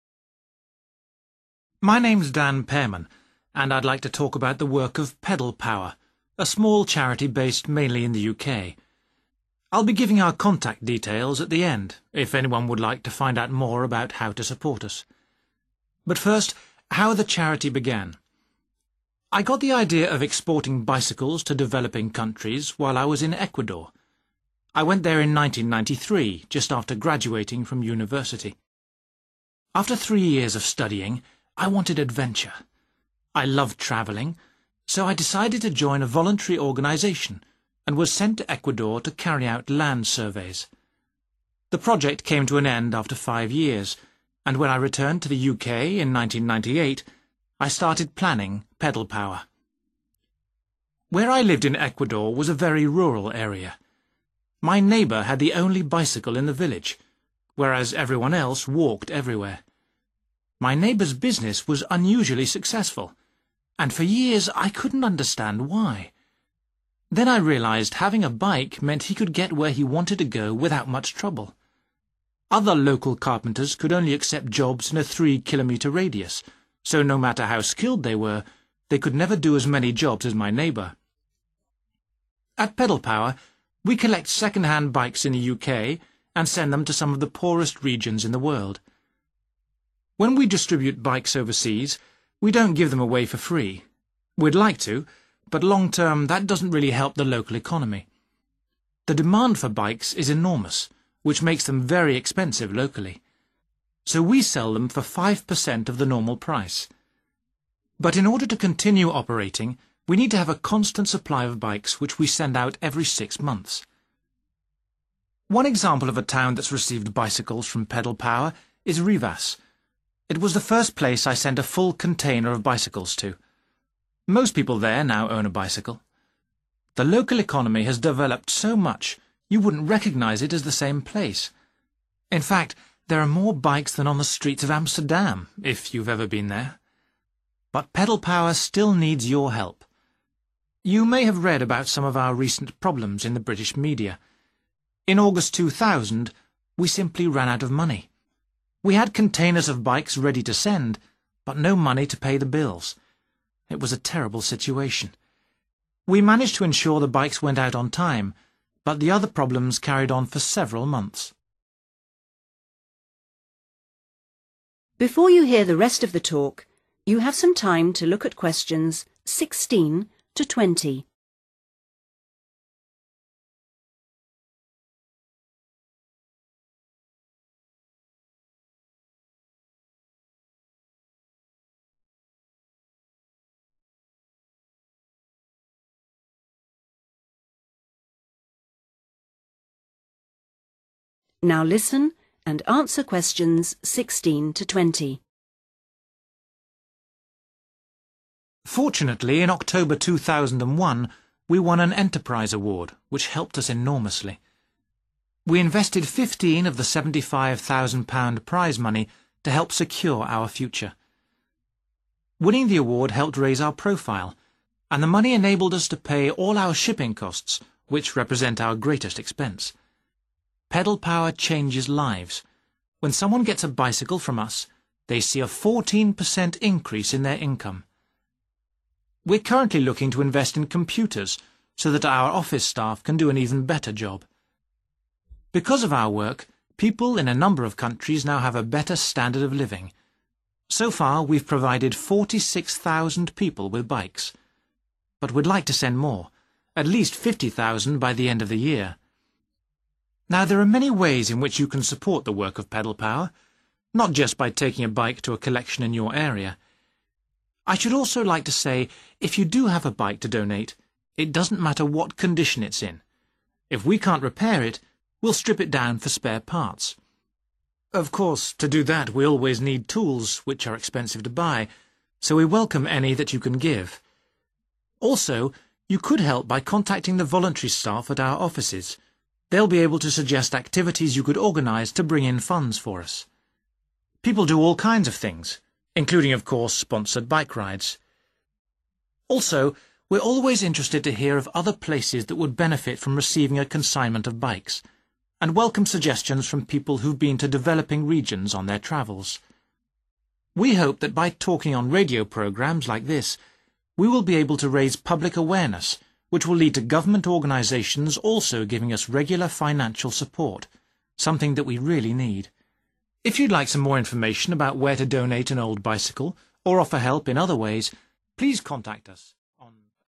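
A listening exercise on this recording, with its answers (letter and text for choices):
Choose the correct letter, A, B, or C.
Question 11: In 1993 Dan Pearman went to Ecuador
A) as a tourist guide.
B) as part of his studies.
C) as a voluntary worker.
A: C) as a voluntary worker.

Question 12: Dan's neighbour was successful in business because he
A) employed carpenters from the area.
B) was the most skilled craftsman in the town.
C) found it easy to reach customers.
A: C) found it easy to reach customers.

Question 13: Dan says the charity relies on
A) getting enough bicycles to send regularly.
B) finding new areas which need the bicycles.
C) charging for the bicycles it sends abroad.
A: A) getting enough bicycles to send regularly.

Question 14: What does Dan say about the town of Rivas?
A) It has received the greatest number of bikes.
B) It has almost as many bikes as Amsterdam.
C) Its economy has been totally transformed.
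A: C) Its economy has been totally transformed.

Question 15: What problem did the charity face in August 2000?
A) It couldn't meet its overheads.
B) It had to delay sending the bikes.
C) It was criticised in the British media.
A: A) It couldn't meet its overheads.

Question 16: How much money did the charity receive when it won an award?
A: £75,000

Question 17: What is the charity currently hoping to buy?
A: computers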